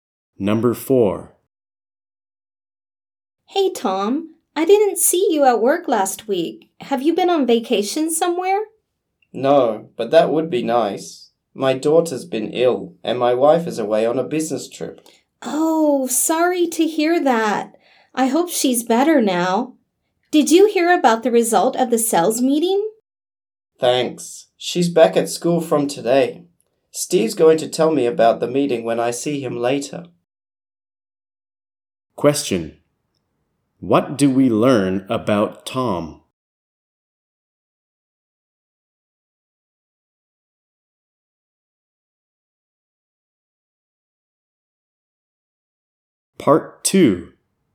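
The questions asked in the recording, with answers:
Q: What do we learn about Tom?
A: He missed work last week to look after his sick daughter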